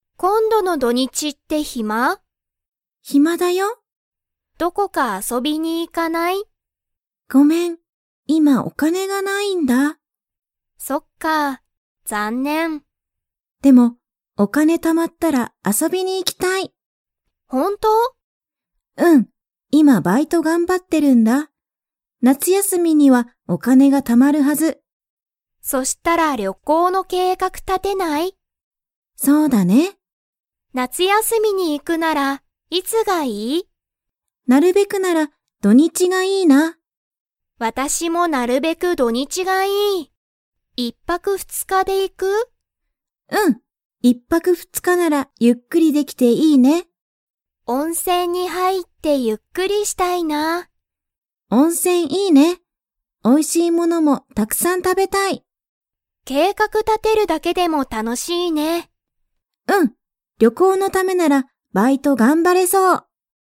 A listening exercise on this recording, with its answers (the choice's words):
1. マユミは、今度こんどの土日どにち遊あそびに 。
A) 行いく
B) 行いかない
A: 行いかない

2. マユミは、旅行りょこうのために何なにを頑張がんばりますか?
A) 勉強べんきょう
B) 温泉おんせん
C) 夏休なつやすみ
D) バイト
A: バイト

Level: Level 4